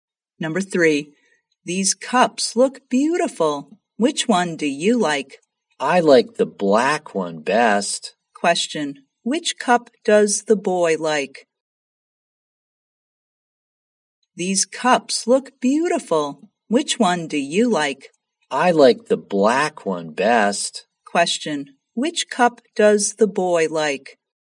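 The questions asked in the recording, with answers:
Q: which cup does the boy like?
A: The black one.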